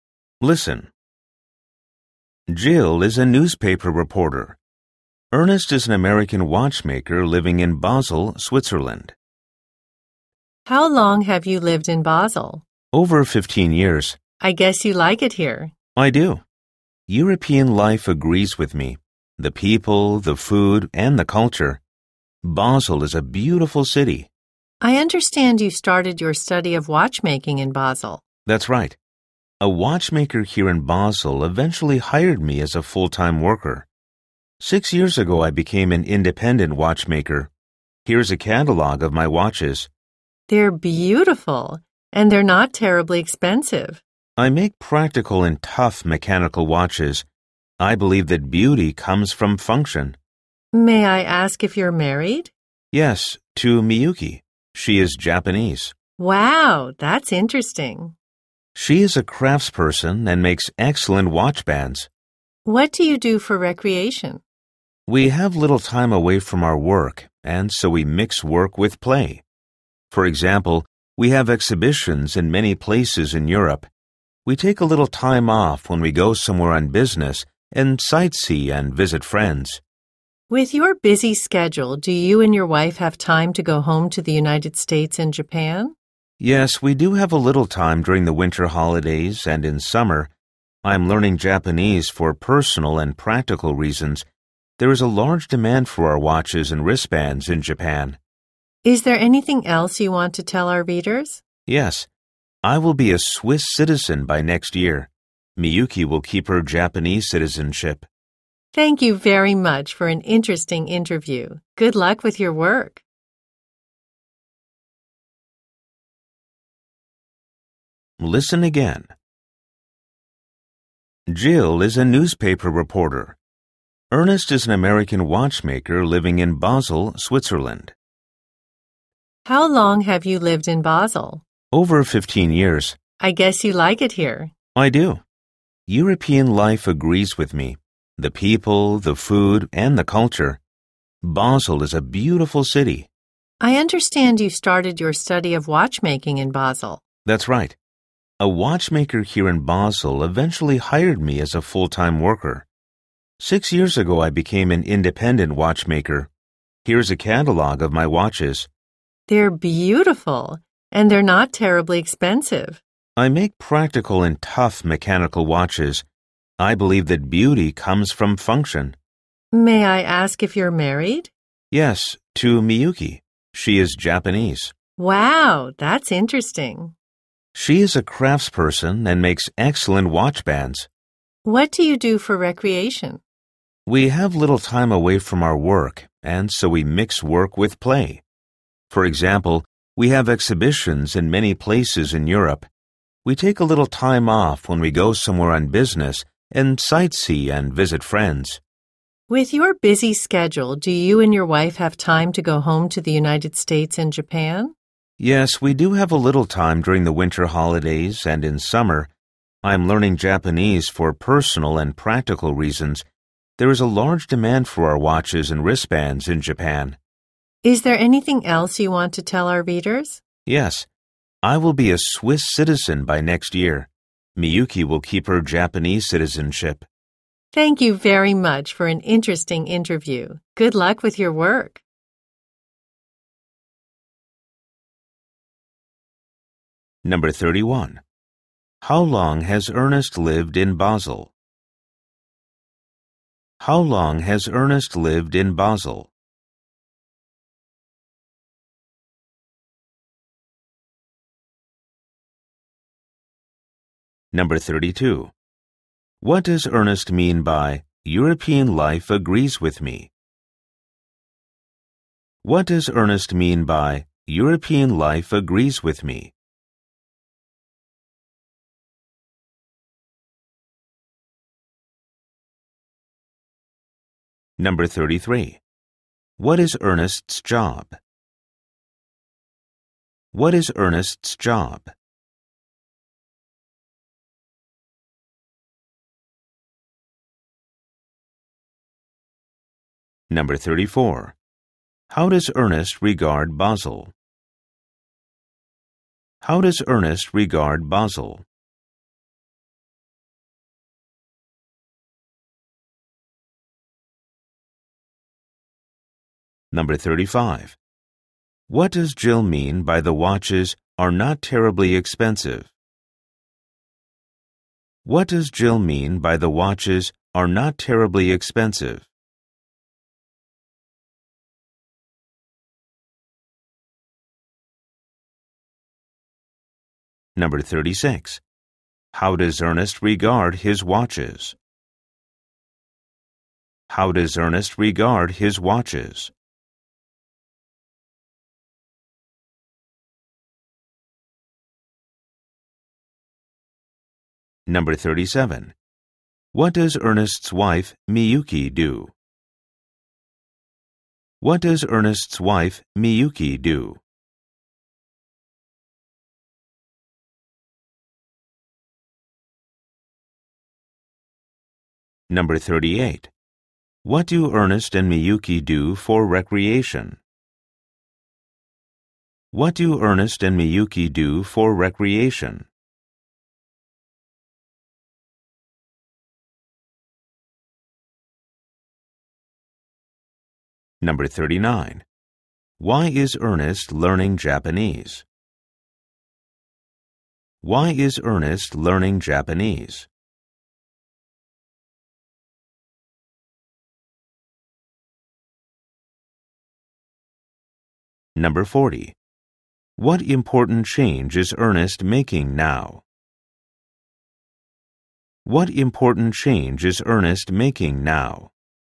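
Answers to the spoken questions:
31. Over 15 years
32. He likes living in Europe.
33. Independent watchmaker
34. As a beautiful city
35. The watches are reasonably priced.
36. As practical and tough, with their beauty coming from their function
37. She is a craftsperson who makes watch bands.
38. They mix work with play: on business trips they sightsee and visit friends.
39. For personal and practical reasons, since there is a large demand for their products in Japan
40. He is becoming a Swiss citizen.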